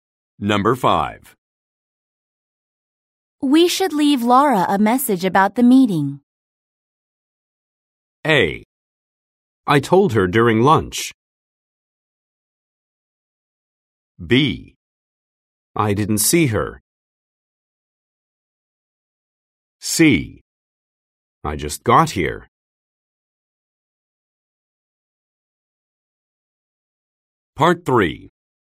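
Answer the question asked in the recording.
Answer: A: I told her during lunch.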